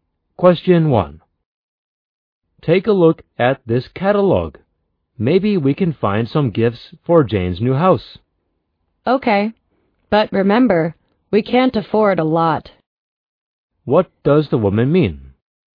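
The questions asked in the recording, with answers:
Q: What does the woman mean?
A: They can't spend much money on gifts for Jane.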